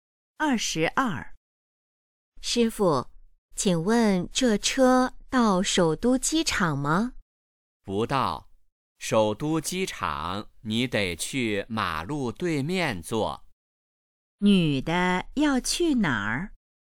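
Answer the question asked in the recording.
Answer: 首都机场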